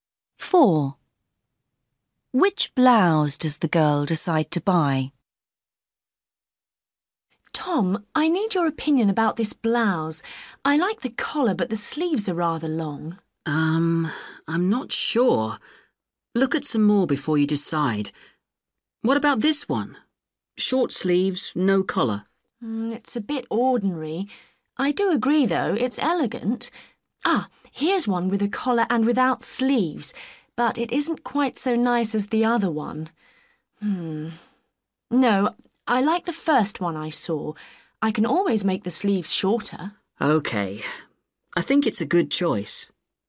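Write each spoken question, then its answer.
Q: Which blouse does the girl decide to buy?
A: The one with a collar and long sleeves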